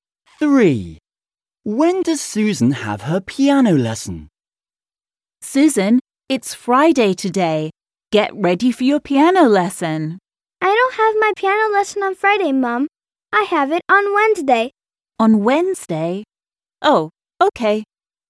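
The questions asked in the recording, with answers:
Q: When does Susan have her piano lesson?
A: On Wednesday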